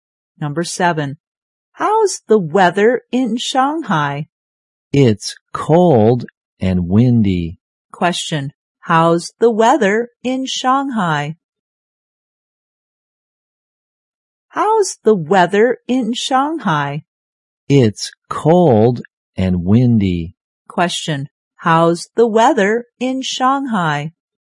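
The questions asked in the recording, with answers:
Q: Question, how's the weather in Shanghai?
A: Cold and windy.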